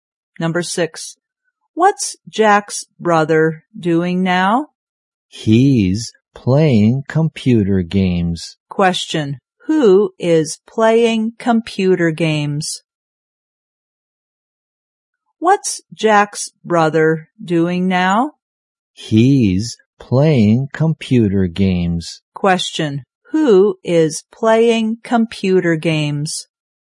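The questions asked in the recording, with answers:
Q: who is playing computer games?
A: Jack's brother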